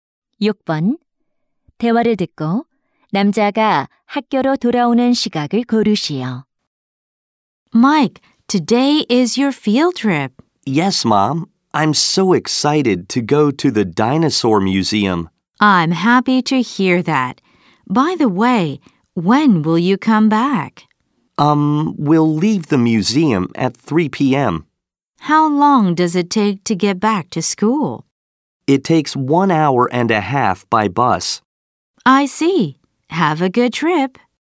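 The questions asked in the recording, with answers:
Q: 대화를 듣고 남자가 학교로 돌아오는 시각을 고르시오.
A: 오후 4시 30분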